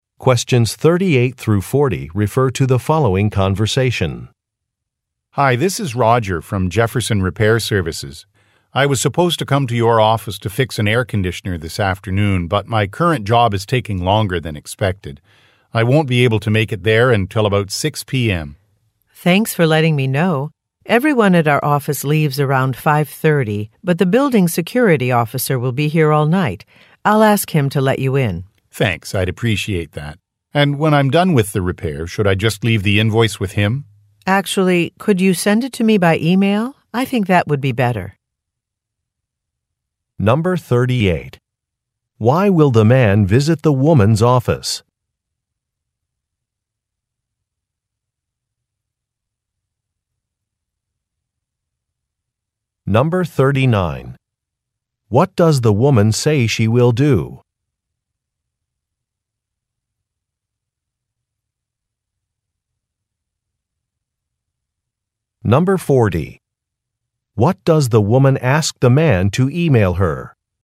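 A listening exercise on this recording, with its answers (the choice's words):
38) Why will the man visit the woman's office?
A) To make a repair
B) To pick up a package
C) To give a presentation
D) To set up a workstation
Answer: To make a repair

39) What does the woman say she will do?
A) Reserve a conference room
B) Meet a customer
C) Talk to a security officer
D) Review an estimate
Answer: Talk to a security officer

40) What does the woman ask the man to e-mail her?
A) A survey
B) A report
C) An invoice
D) An agenda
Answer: An invoice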